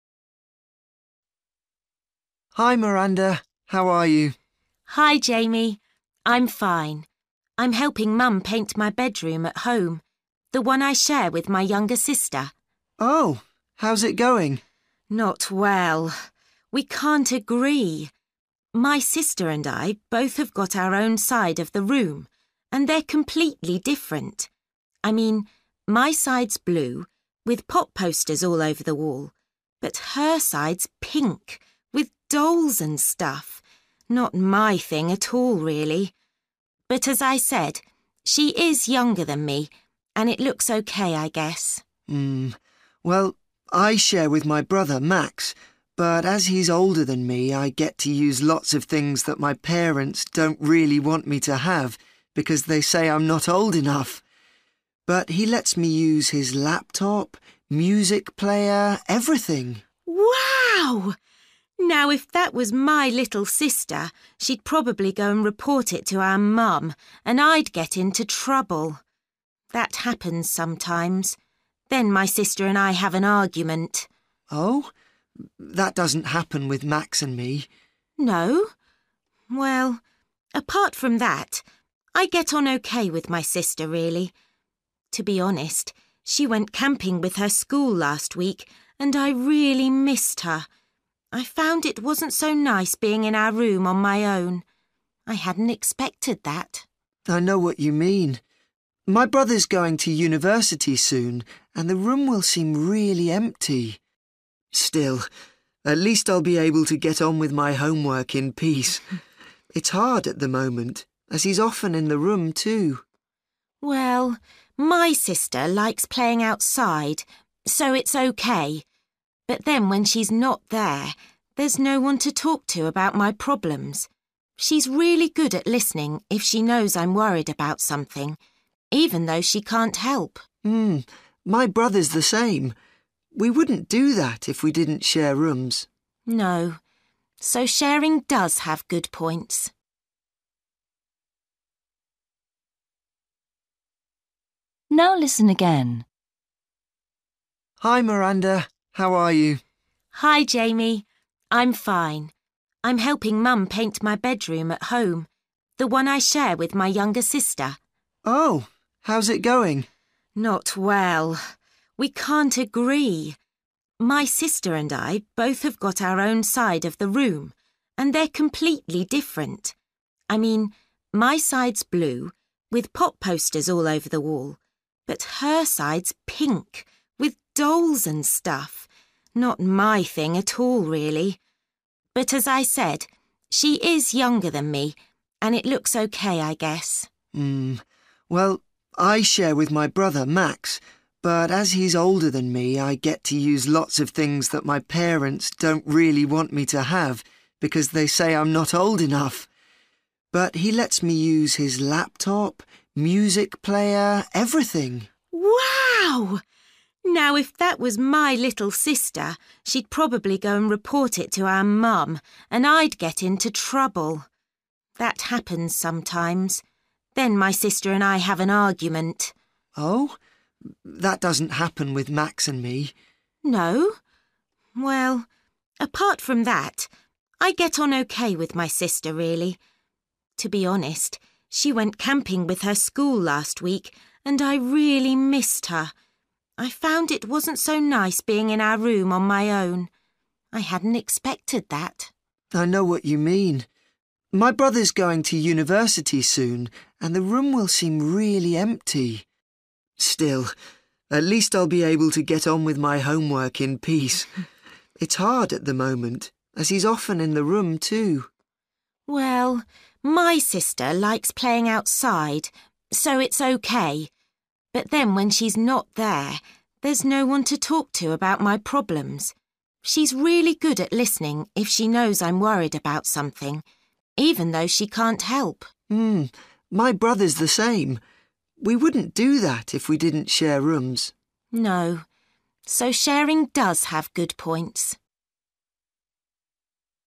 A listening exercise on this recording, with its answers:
Decide if each sentence is correct or incorrect.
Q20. Miranda accepts what her sister's side of the room looks like.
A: YES

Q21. Jamie complains that his brother refuses to share his electronic equipment.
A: NO

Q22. Miranda is annoyed about some things that her sister tells their mother.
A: YES

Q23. Miranda was surprised that she felt lonely when her sister was away.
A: YES

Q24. Despite sharing a bedroom, Jamie finds he can still easily do his homework.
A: NO

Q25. Jamie and Miranda can both share problems with their brother or sister.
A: YES

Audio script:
Jamie: Hi, Miranda. How are you?
Miranda: Hi, Jamie. I'm fine! I'm helping Mum paint my bedroom at home – the one I share with my younger sister.
Jamie: Oh, how's it going?
Miranda: Not well – we can't agree! My sister and I both have got our own side of the room, and they're completely different! I mean, my side's blue, with pop posters all over the wall. But her side's pink, with dolls and stuff. Not my thing at all really, but as I said, she is younger than me – and it looks OK, I guess.
Jamie: Mmm – well, I share with my brother Max, but as he's older than me, I get to use lots of things that my parents don't really want me to have, because they say I'm not old enough. But he lets me use his laptop, music player ... everything!
Miranda: Wow! Now, if that was my little sister, she'd probably go and report it to our mum, and I'd get into trouble! That happens sometimes. Then my sister and I have an argument!
Jamie: Oh? That doesn't happen with Max and me ...
Miranda: No? Well, apart from that, I get on OK with my sister, really. To be honest, she went camping with her school last week, and I really missed her. I found it wasn't so nice being in our room on my own. I hadn't expected that.
Jamie: I know what you mean. My brother's going to university soon, and the room will seem really empty. Still, at least I'll be able to get on with my homework in peace – it's hard at the moment, as he's often in the room, too.
Miranda: Well, my sister likes playing outside, so it's OK. But then when she's not there, there's no-one to talk to about my problems. She's really good at listening if she knows I'm worried about something, even though she can't help.
Jamie: Mmm, my brother's the same. We wouldn't do that if we didn't share rooms.
Miranda: No ... so sharing does have good points ...

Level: B1 – Intermediate